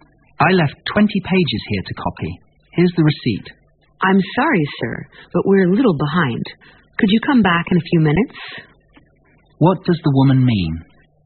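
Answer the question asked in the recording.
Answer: The copies aren't ready yet; the man should come back in a few minutes.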